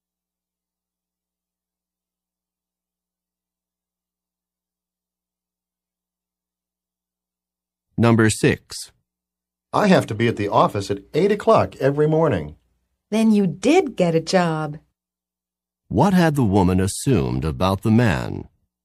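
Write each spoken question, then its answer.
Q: What had the woman assumed about the man?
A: That he did not have a job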